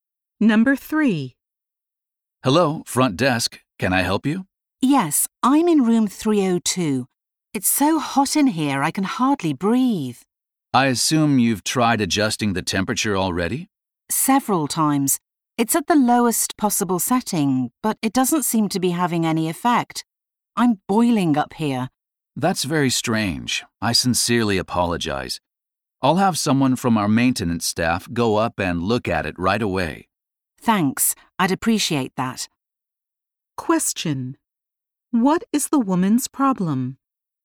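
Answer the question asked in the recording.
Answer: Her hotel room is too hot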